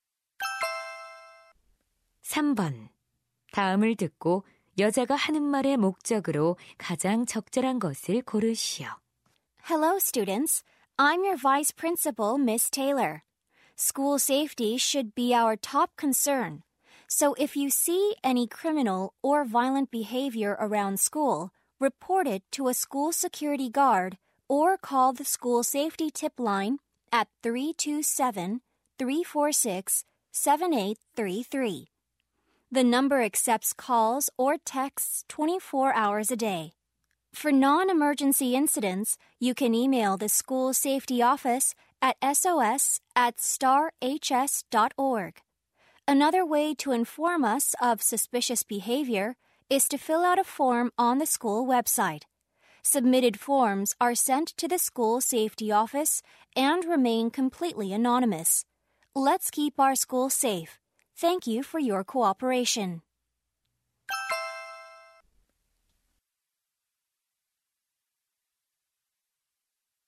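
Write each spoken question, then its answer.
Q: 다음을 듣고 여자가 하는 말의 목적으로 가장 적절한 것을 고르시오.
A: 교내 안전 위협 행위를 신고하는 방법을 안내하려고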